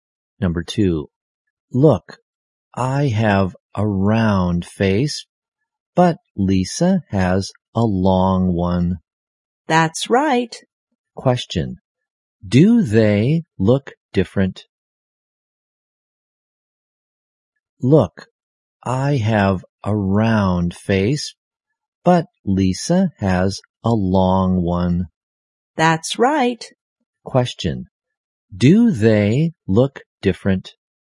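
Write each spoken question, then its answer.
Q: do they look different?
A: Yes, one has a round face and Lisa has a long one.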